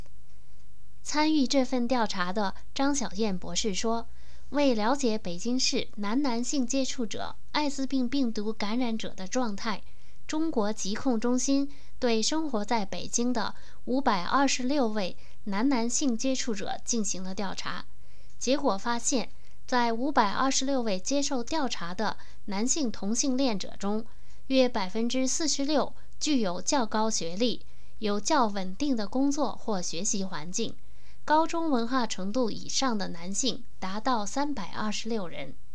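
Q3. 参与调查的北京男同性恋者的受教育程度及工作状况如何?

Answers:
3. 约46%具有较高学历,有较稳定的工作或学习环境

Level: 3rd Year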